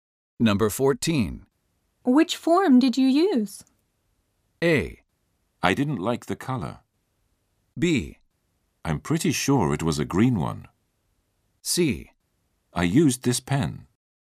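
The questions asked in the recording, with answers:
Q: Which form did you use?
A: B: I'm pretty sure it was a green one.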